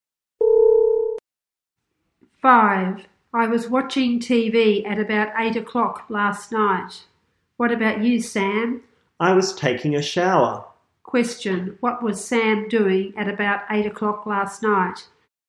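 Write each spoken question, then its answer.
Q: What was Sam doing at about 8 o'clock last night?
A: Taking a shower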